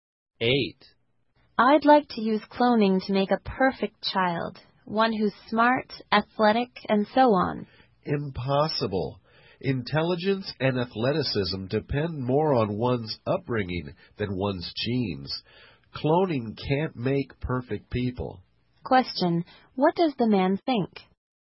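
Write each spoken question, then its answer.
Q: what does the man think?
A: Cloning can't make perfect people.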